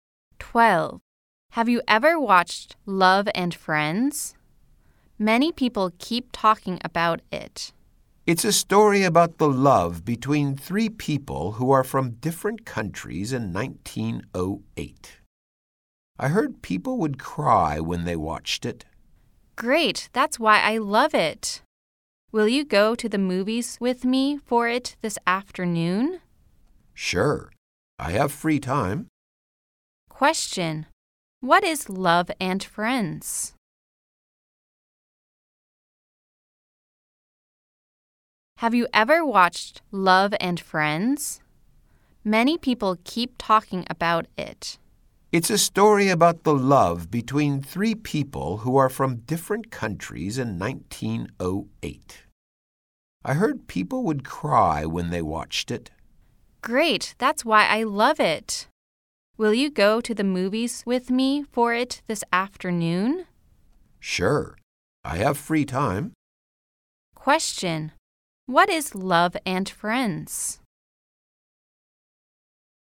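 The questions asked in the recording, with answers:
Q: Question, what is Love and Friends?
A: A movie: a love story about three people from different countries in 1908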